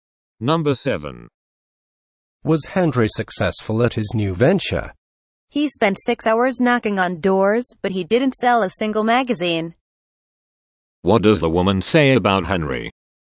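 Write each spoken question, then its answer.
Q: What does the woman say about Henry?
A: He didn't sell a single magazine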